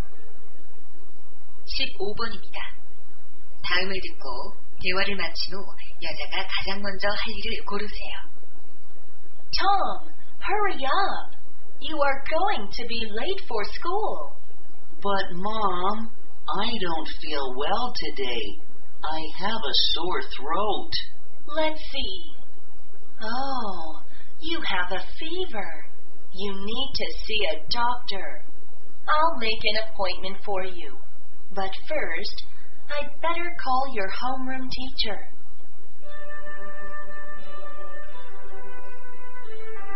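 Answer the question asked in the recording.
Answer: 담임 선생님께 전화하기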